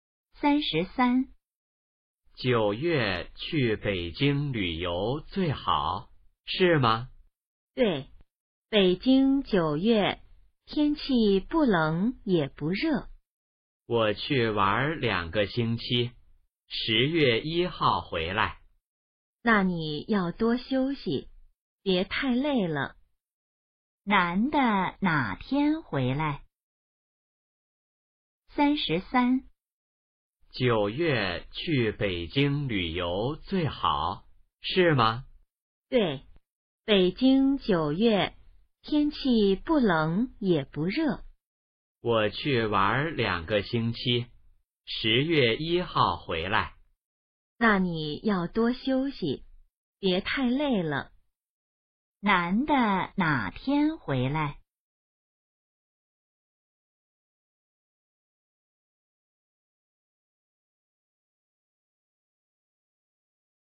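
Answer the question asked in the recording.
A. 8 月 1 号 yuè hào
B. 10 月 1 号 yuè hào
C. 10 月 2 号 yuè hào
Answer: B. 10 月 1 号 yuè hào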